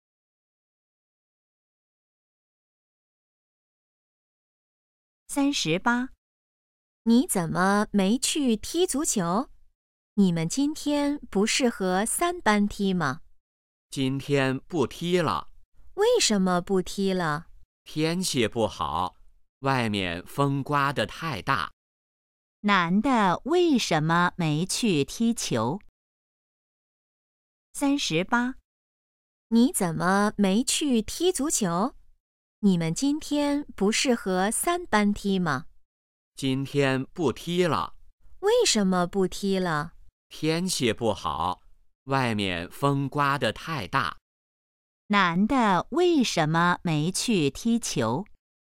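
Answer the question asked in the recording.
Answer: 风太大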